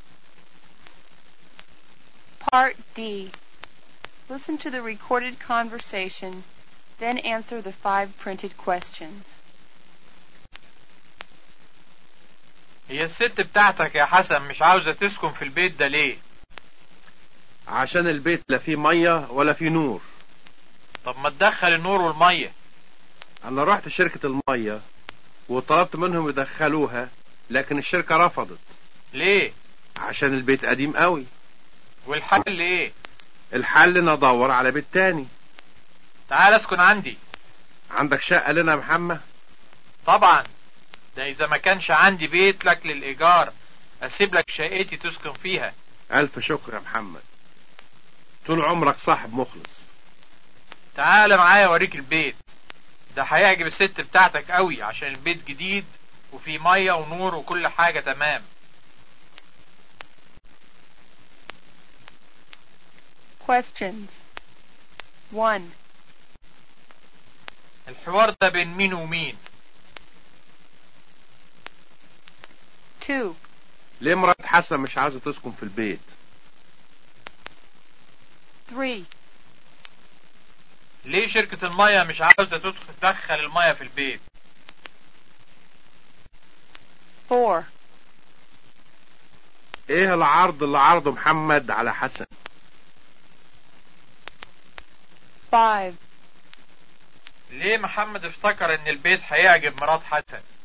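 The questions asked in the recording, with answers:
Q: الحوار ده بين مين ومين؟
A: بين حسن ومحمد

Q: ليه مرات حسن مش عايزة تسكن في البيت؟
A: عشان البيت ما فيهوش مية ولا نور

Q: ليه شركة المية مش عايزة تدخل المية في البيت؟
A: عشان البيت قديم قوي

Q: ايه العرض اللي عرضه محمد على حسن؟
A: يسكن عنده في بيته، ولو ما فيش شقة يسيب له شقته

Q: ليه محمد افتكر ان البيت هيعجب مرات حسن؟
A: عشان البيت جديد وفيه مية ونور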